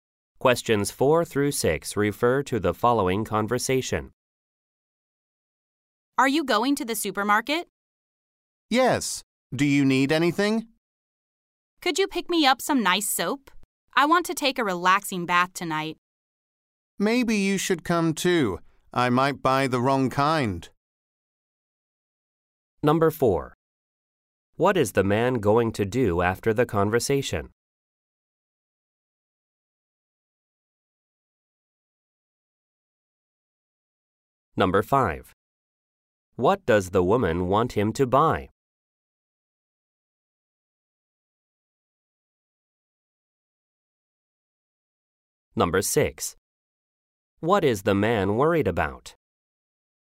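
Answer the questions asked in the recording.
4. Go to the supermarket
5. Soap
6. Buying the wrong kind of soap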